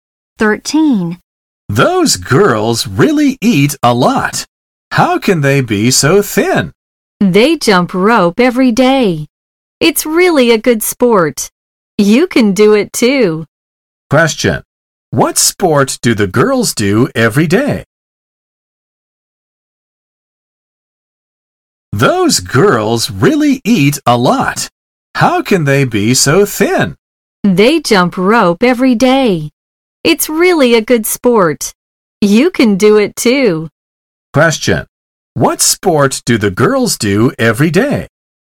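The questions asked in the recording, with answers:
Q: Question. What sport do the girls do every day?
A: Jump rope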